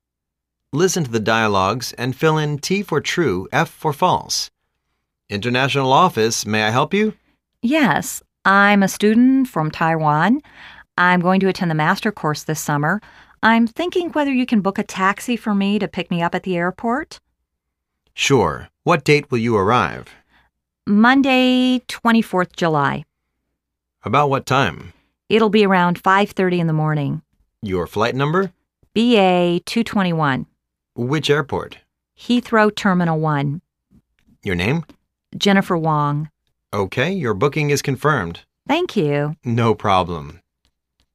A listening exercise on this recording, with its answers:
Listen to the dialogues and fill in T for "True",F for "False".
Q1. She calls to the information center.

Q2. She requires a taxi to pick her up at the airport.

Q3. She'II arrive on Friday afternoon.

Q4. Her flight number is BQ221.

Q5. Her arriving airport is Heathrow, Terminal One.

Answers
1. False
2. True
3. False
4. False
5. True